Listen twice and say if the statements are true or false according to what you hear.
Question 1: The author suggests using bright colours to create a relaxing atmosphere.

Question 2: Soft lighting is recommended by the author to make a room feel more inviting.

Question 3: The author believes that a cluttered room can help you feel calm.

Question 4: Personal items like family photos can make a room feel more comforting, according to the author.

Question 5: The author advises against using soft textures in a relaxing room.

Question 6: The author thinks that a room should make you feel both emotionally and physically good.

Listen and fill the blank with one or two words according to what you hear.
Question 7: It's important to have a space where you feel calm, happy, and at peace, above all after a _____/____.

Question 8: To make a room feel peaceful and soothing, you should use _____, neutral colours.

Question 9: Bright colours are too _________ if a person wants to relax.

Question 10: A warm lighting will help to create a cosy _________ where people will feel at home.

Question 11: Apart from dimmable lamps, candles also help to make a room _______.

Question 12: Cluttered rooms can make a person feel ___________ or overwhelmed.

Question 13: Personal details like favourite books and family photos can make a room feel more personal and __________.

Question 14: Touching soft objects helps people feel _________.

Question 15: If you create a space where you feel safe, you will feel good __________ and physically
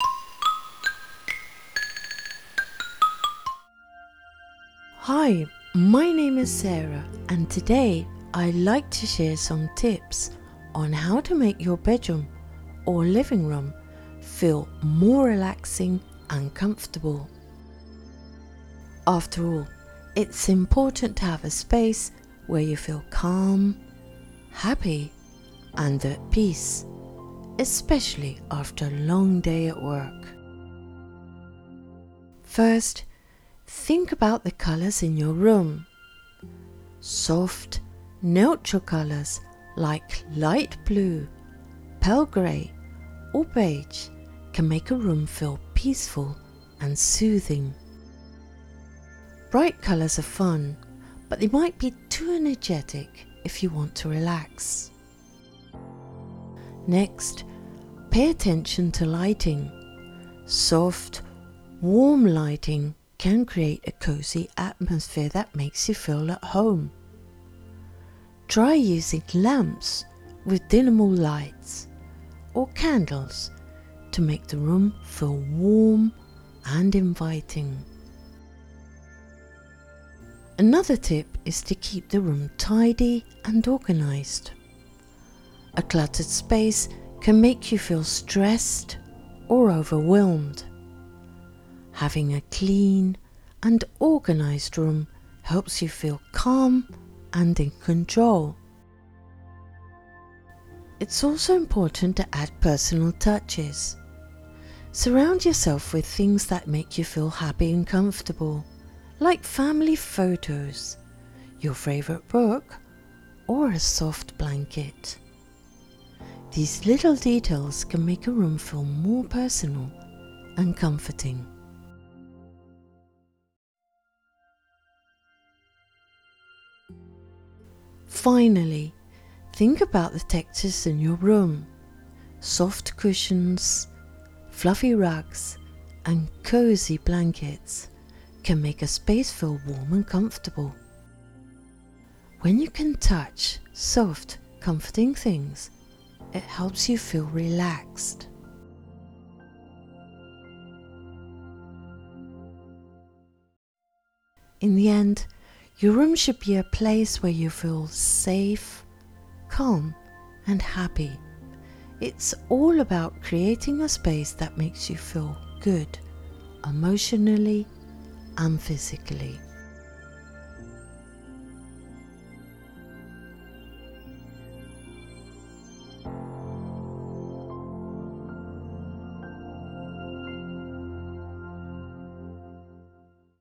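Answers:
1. False
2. True
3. False
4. True
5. False
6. True
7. long day
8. soft
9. energetic
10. atmosphere
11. warm and inviting
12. stressed
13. comforting
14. relaxed
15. emotionally

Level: B2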